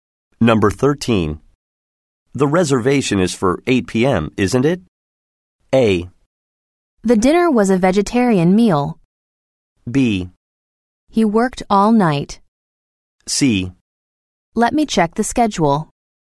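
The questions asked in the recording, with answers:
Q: The reservation is for 8 p.m., isn't it?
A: C: Let me check the schedule.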